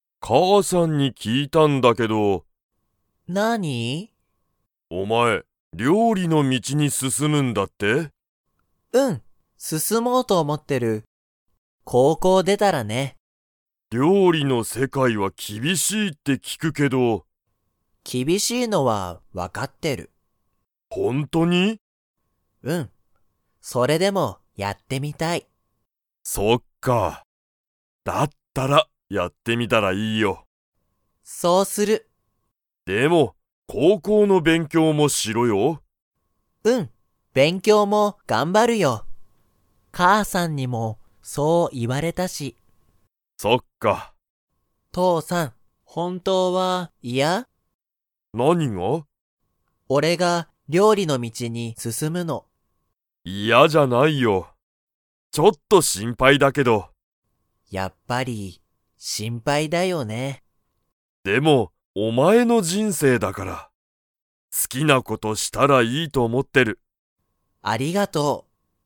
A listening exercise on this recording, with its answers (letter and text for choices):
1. ケンは、 を出でたら料理りょうりの道みちに進すすもうと思おもっている。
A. 高校こうこう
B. 大学だいがく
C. 会社かいしゃ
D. 人生じんせい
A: A. 高校こうこう

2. 父ちちは、ケンが料理りょうりの道みちに進すすむのが嫌いやですか?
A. はい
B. いいえ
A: B. いいえ

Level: Level 3